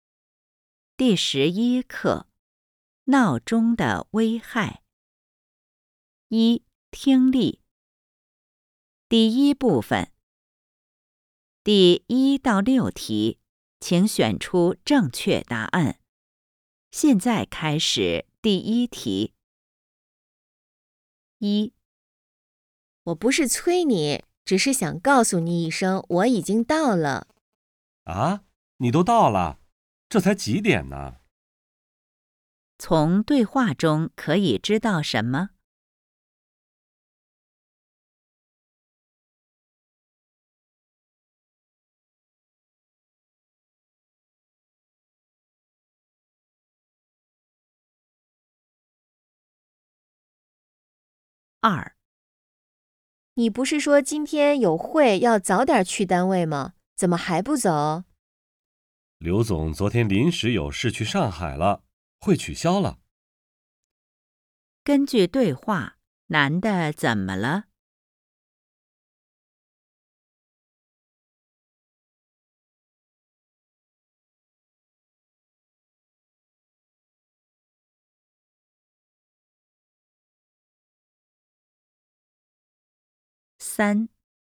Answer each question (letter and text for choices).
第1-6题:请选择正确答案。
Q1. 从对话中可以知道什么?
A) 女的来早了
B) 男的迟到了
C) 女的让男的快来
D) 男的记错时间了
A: A) 女的来早了

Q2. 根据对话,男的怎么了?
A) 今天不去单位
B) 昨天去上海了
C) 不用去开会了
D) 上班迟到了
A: C) 不用去开会了

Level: HSK 5